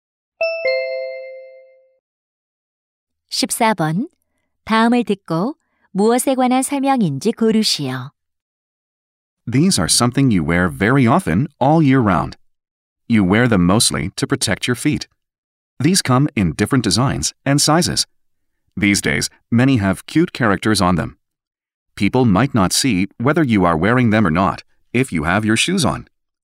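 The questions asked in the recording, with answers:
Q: 다음을 듣고 무엇에 관한 설명인지 고르시오.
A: 양말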